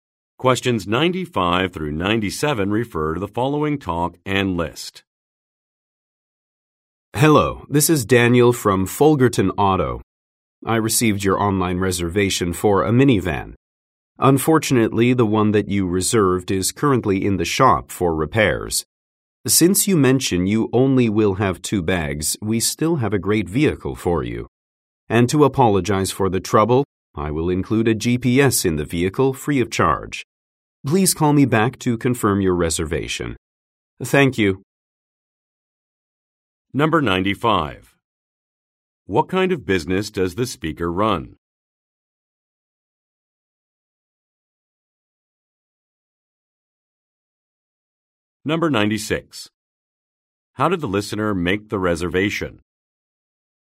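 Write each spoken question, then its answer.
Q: What kind of business does the speaker run?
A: Car rental

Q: How did the listener make the reservation?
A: Online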